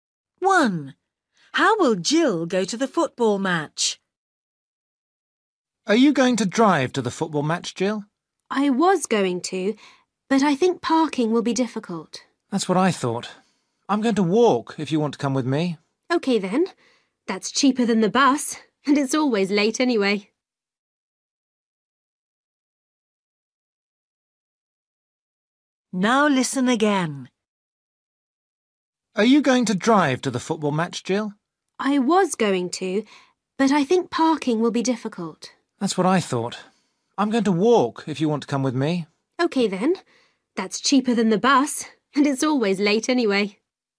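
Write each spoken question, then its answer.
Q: How will Jill go to the football match?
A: She will walk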